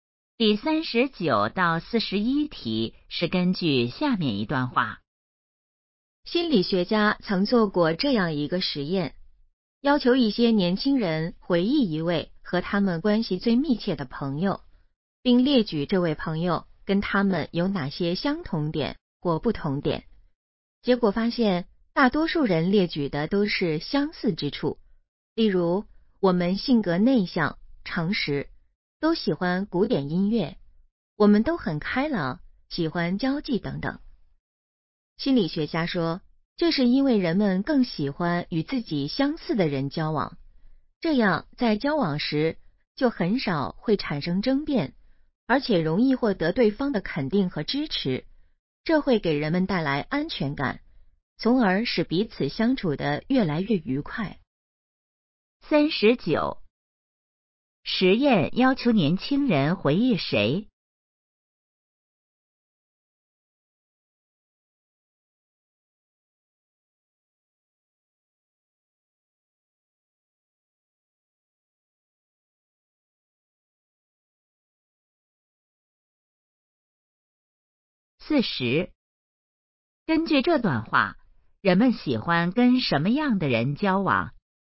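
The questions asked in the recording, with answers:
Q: 实验要求年轻人回忆谁?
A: 和他们关系最密切的朋友

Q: 根据这段话,人们喜欢跟什么样的人交往?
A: 与自己相似的人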